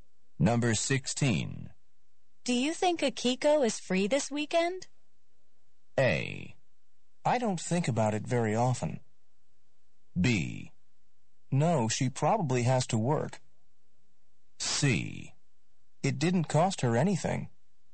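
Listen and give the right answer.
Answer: B: No, she probably has to work.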